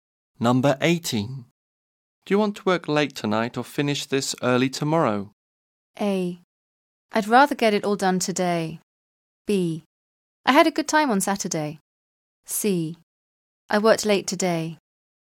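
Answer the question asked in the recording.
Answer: A: I'd rather get it all done today.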